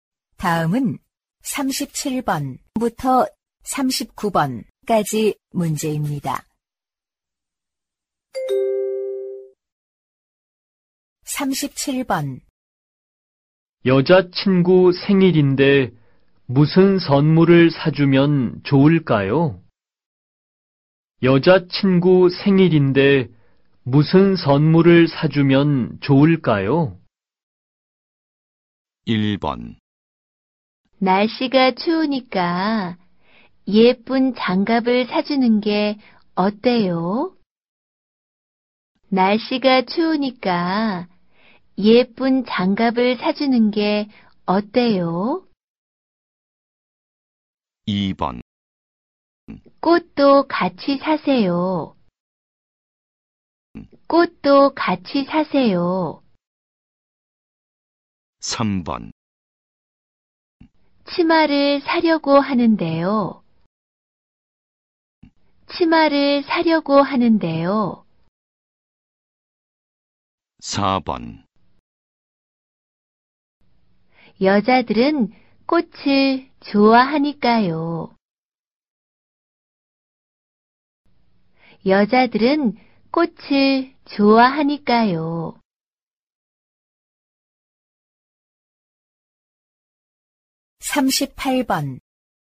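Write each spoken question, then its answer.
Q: 여자친구 생일인데 무슨 선물을 사주면 좋을까요?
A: 1: 날씨가 추우니까 예쁜 장갑을 사주는 게 어때요?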